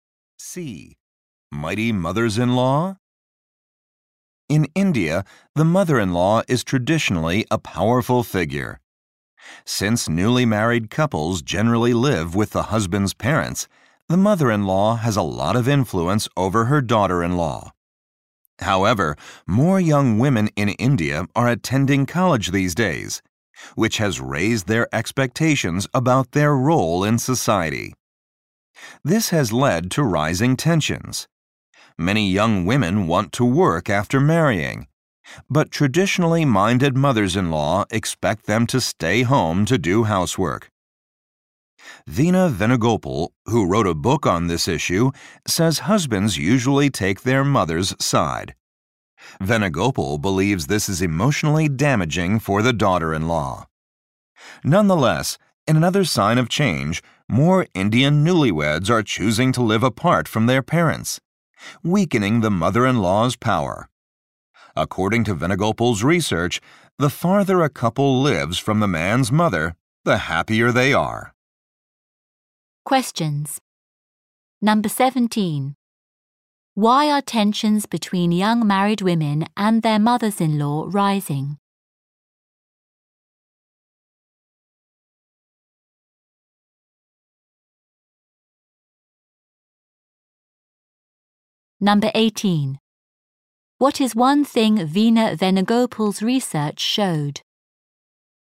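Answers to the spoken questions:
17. More young women go to college and want to work after marriage.
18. The farther a couple lives from the man's mother, the happier they are.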